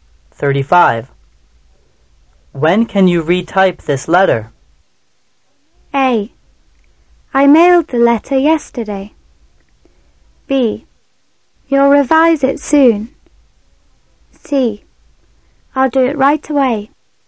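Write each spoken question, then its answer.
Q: When can you retype this letter?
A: C: I'll do it right away.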